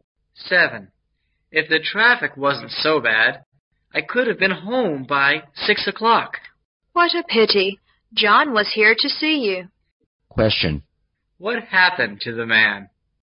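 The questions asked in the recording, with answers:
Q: What happened to the man?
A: He got home late because of traffic and missed John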